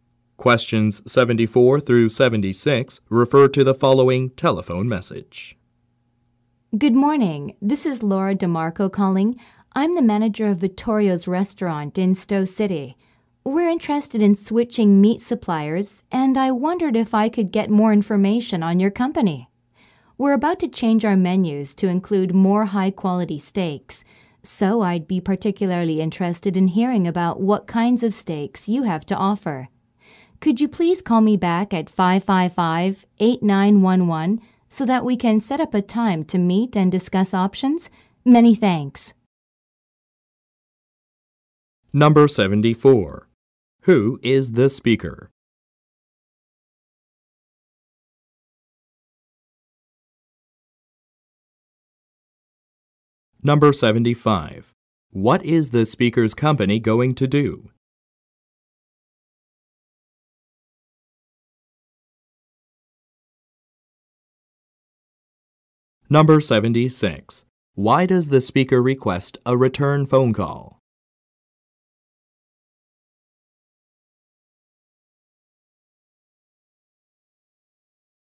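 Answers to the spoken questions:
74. A restaurant manager
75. Change its menus to include more high-quality steaks
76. To set up a time to meet and discuss options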